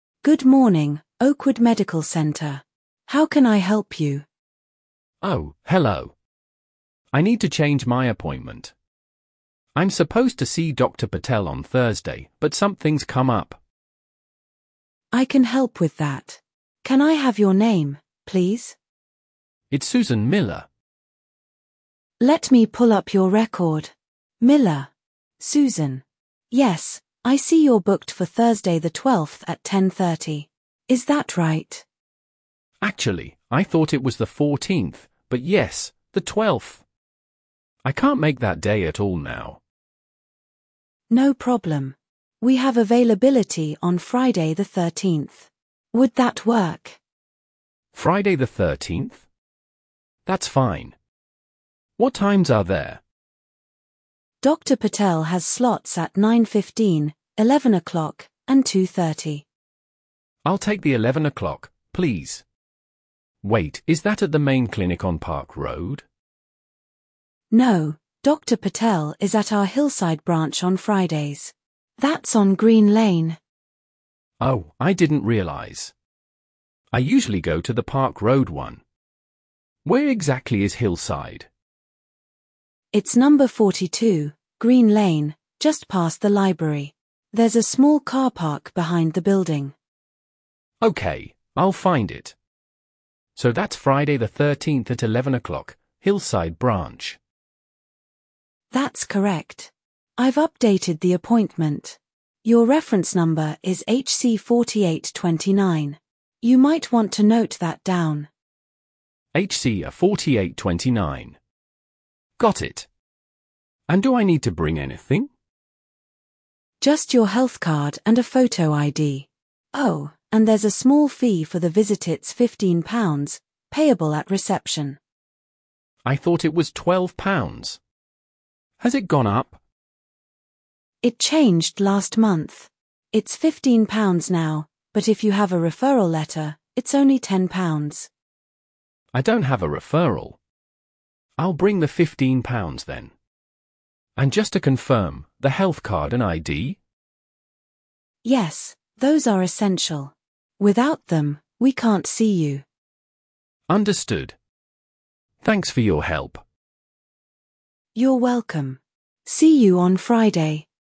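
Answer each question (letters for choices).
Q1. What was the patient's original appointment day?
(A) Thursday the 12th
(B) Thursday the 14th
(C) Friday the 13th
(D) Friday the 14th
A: A

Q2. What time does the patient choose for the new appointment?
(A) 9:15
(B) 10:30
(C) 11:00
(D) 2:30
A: C

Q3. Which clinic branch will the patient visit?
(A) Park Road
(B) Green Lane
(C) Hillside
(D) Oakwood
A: C

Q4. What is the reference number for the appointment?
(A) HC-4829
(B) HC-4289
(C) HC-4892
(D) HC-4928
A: A

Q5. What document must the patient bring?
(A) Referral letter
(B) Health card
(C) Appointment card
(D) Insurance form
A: B

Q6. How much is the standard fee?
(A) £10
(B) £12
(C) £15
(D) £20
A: C

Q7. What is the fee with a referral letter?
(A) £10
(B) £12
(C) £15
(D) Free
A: A

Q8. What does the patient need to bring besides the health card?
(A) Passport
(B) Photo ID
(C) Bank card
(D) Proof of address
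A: B

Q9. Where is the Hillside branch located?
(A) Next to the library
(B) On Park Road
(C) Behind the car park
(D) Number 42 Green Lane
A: D

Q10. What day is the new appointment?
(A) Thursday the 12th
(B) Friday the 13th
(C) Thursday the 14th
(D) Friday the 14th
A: B

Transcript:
Clinic Receptionist: Good morning, Oakwood Medical Centre. How can I help you?
Patient: Oh, hello. I need to change my appointment. I'm supposed to see Dr. Patel on Thursday, but something's come up.
Clinic Receptionist: I can help with that. Can I have your name, please?
Patient: It's Susan Miller.
Clinic Receptionist: Let me pull up your record. Miller... Susan. Yes, I see you're booked for Thursday the 12th at 10:30. Is that right?
Patient: Actually, I thought it was the 14th, but yes, the 12th. I can't make that day at all now.
Clinic Receptionist: No problem. We have availability on Friday the 13th. Would that work?
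Patient: Friday the 13th? That's fine. What times are there?
Clinic Receptionist: Dr. Patel has slots at 9:15, 11:00, and 2:30.
Patient: I'll take the 11:00, please. Wait, is that at the main clinic on Park Road?
Clinic Receptionist: No, Dr. Patel is at our Hillside branch on Fridays. That's on Green Lane.
Patient: Oh, I didn't realise. I usually go to the Park Road one. Where exactly is Hillside?
Clinic Receptionist: It's number 42 Green Lane, just past the library. There's a small car park behind the building.
Patient: Okay, I'll find it. So that's Friday the 13th at 11:00, Hillside branch.
Clinic Receptionist: That's correct. I've updated the appointment. Your reference number is HC-4829. You might want to note that down.
Patient: HC-4829. Got it. And do I need to bring anything?
Clinic Receptionist: Just your health card and a photo ID. Oh, and there's a small fee for the visit-it's £15, payable at reception.
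Patient: I thought it was £12. Has it gone up?
Clinic Receptionist: It changed last month. It's £15 now, but if you have a referral letter, it's only £10.
Patient: I don't have a referral. I'll bring the £15 then. And just to confirm, the health card and ID?
Clinic Receptionist: Yes, those are essential. Without them, we can't see you.
Patient: Understood. Thanks for your help.
Clinic Receptionist: You're welcome. See you on Friday.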